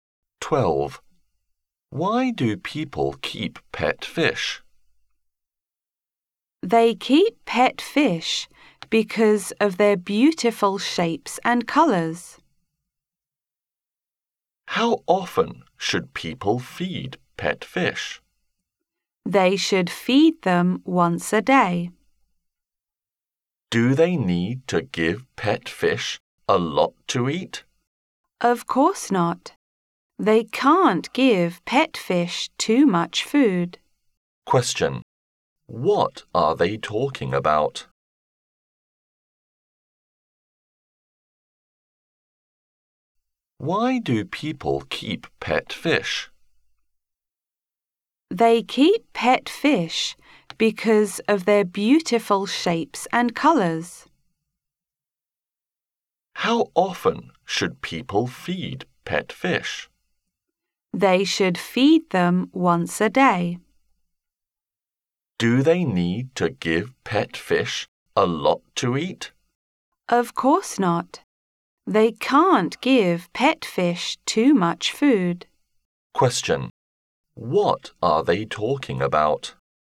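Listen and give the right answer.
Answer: Pet fish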